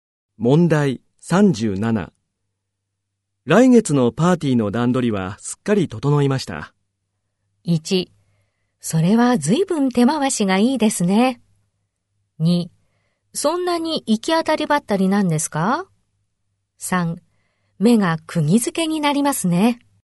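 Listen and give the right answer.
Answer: 1: それは随分手回しがいいですね。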